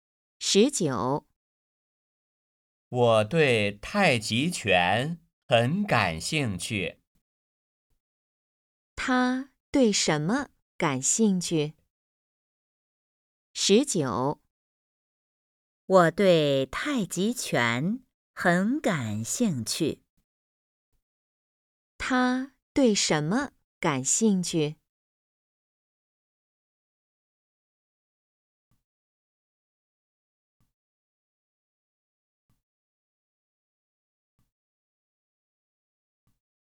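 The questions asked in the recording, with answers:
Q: 他对什么感兴趣?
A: 太极拳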